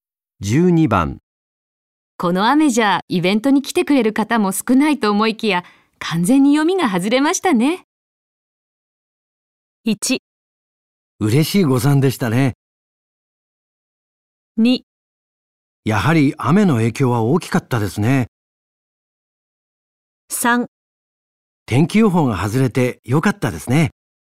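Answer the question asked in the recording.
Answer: 1: 嬉しい誤算でしたね。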